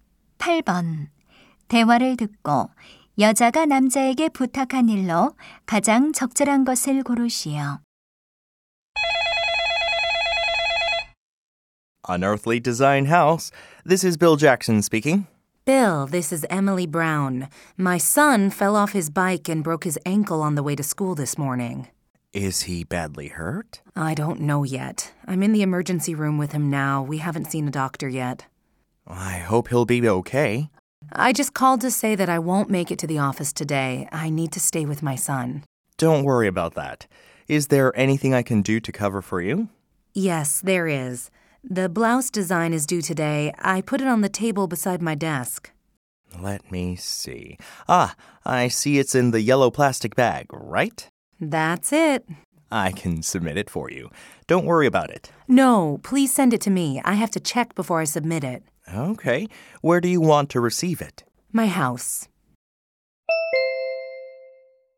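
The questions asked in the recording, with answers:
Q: 대화를 듣고 여자가 남자에게 부탁한 일로 가장 적절한 것을 고르시오.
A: 블라우스 디자인을 자기 집으로 보내 주기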